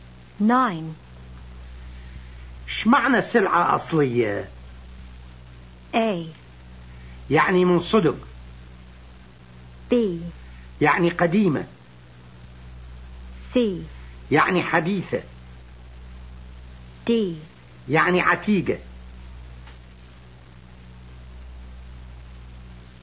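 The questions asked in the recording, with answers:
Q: شمعنا سلعة أصلية؟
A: A: يعني من صدق.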